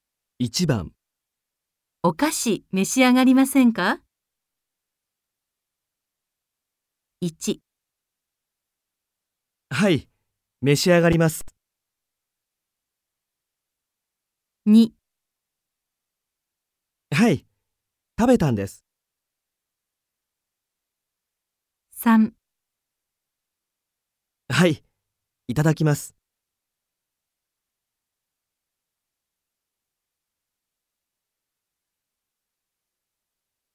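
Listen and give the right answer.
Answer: 3: はい、いただきます。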